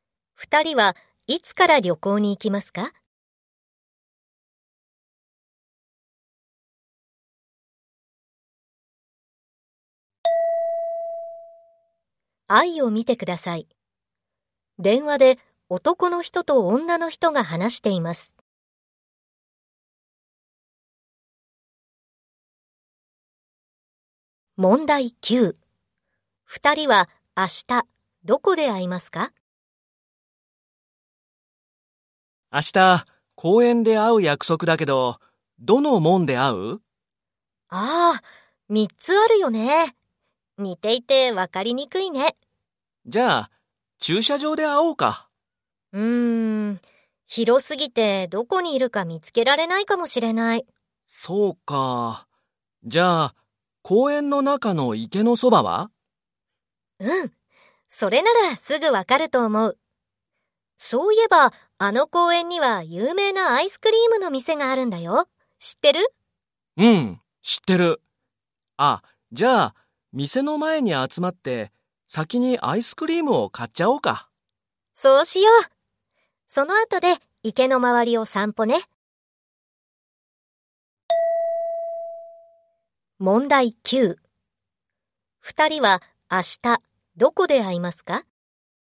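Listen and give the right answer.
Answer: 公園のアイスクリームの店の前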